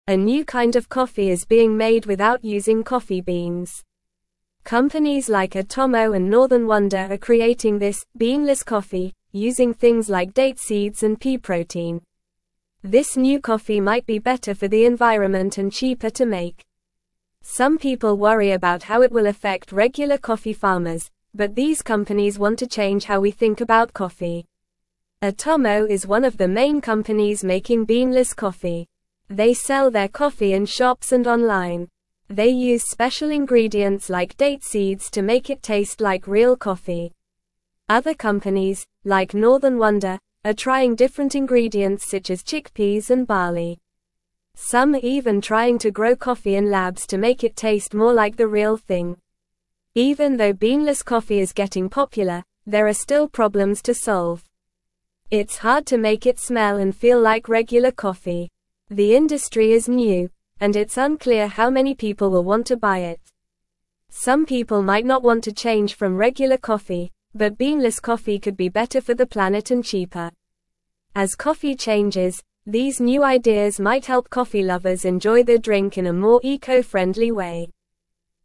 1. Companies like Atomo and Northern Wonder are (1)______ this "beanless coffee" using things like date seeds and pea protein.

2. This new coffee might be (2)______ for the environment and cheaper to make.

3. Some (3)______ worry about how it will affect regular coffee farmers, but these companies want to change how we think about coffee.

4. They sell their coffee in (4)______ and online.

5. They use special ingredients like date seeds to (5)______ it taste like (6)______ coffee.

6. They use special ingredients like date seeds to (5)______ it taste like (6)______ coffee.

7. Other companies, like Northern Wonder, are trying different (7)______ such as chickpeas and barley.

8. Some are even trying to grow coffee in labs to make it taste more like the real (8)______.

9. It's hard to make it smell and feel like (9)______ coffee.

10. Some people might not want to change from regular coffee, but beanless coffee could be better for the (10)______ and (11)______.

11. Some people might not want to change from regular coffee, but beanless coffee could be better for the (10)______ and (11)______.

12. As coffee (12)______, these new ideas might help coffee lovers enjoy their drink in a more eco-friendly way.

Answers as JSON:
{"1": "creating", "2": "better", "3": "people", "4": "shops", "5": "make", "6": "real", "7": "ingredients", "8": "thing", "9": "regular", "10": "planet", "11": "cheaper", "12": "changes"}

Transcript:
A new kind of coffee is being made without using coffee beans. Companies like Atomo and Northern Wonder are creating this "beanless coffee" using things like date seeds and pea protein. This new coffee might be better for the environment and cheaper to make. Some people worry about how it will affect regular coffee farmers, but these companies want to change how we think about coffee.
Atomo is one of the main companies making beanless coffee. They sell their coffee in shops and online. They use special ingredients like date seeds to make it taste like real coffee. Other companies, like Northern Wonder, are trying different ingredients such as chickpeas and barley. Some are even trying to grow coffee in labs to make it taste more like the real thing.
Even though beanless coffee is getting popular, there are still problems to solve. It's hard to make it smell and feel like regular coffee. The industry is new, and it's unclear how many people will want to buy it. Some people might not want to change from regular coffee, but beanless coffee could be better for the planet and cheaper. As coffee changes, these new ideas might help coffee lovers enjoy their drink in a more eco-friendly way.

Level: Level 2